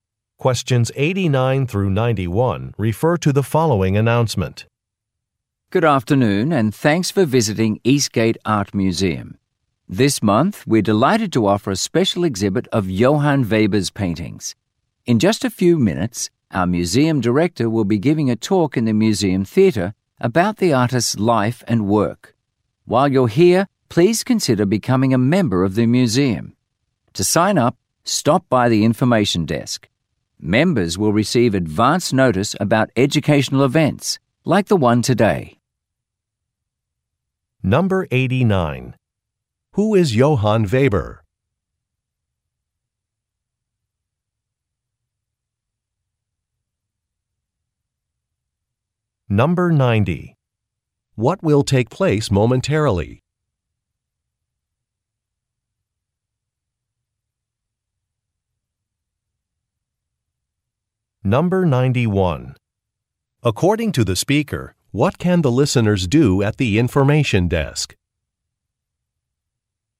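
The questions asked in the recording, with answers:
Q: Who is Johann Weber?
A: A painter

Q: What will take place momentarily?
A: A talk by the museum director

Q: According to the speaker, what can the listeners do at the information desk?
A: Sign up for a museum membership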